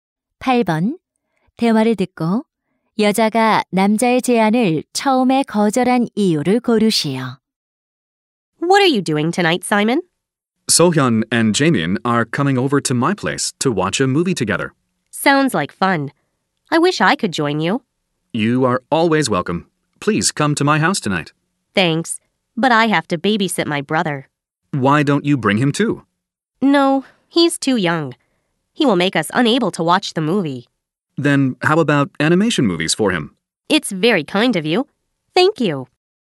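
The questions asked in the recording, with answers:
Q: 대화를 듣고 여자가 남자의 제안을 처음에 거절한 이유를 고르시오.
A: 남동생을 돌봐야 해서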